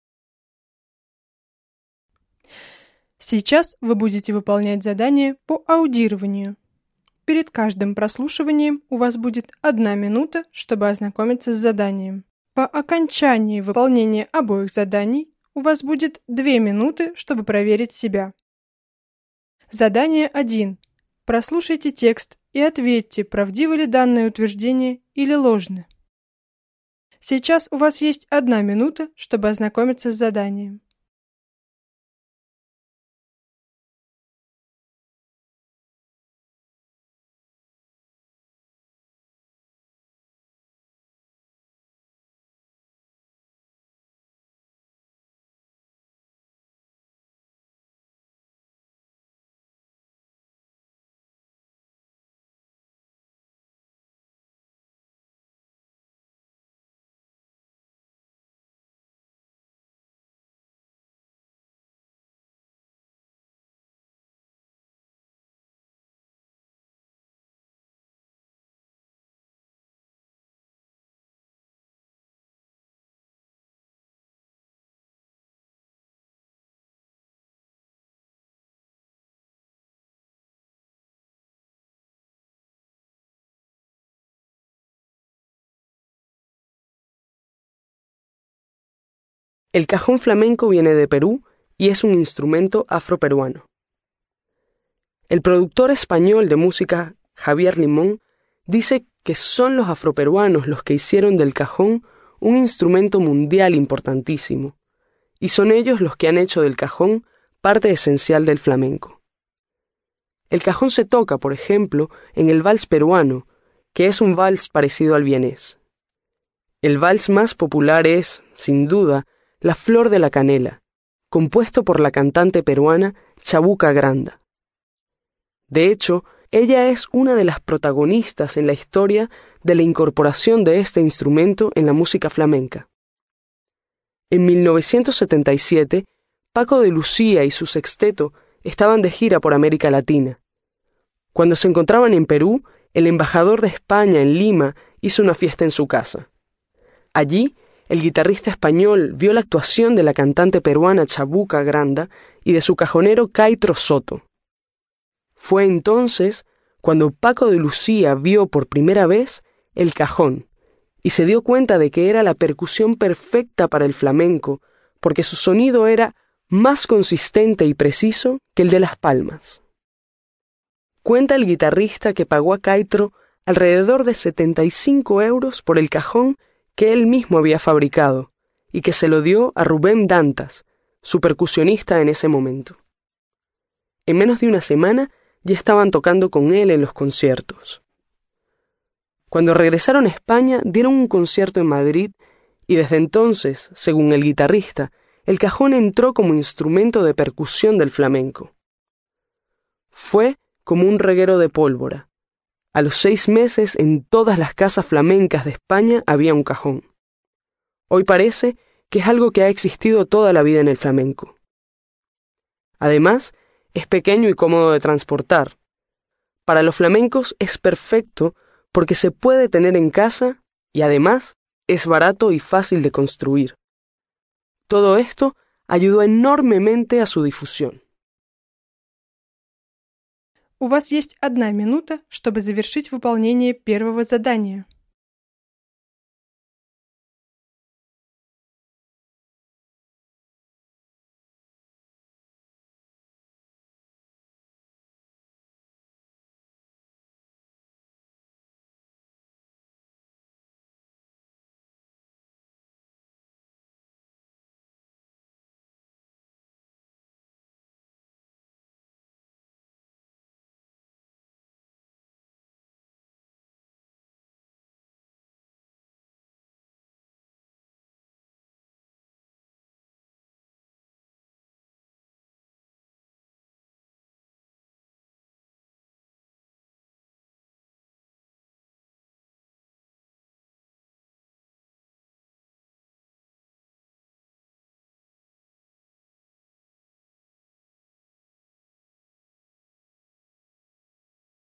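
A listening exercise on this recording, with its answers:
No 1-7. Прослушайте текст и ответьте на вопрос, правдивы ли данные утверждения или ложны (verdadero o falso).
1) Los afroperuanos no hicieron del cajón un instrumento mundial muy importante.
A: falso

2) Chabuca Granda compuso "La flor de la canela".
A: verdadero

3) El grupo musical de Paco de Lucía estaba conformado por siete integrantes.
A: falso

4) Paco de Lucía descubre el cajón flamenco durante un viaje por Andalucía.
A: falso

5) El cajonero de Chabuca Granda se llamaba Caitro Soto.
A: verdadero

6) El cajón flamenco se construyó por primera vez en Madrid.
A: falso

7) El cajón es un instrumento muy incómodo y difícil de transportar.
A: falso

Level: 6-7 классов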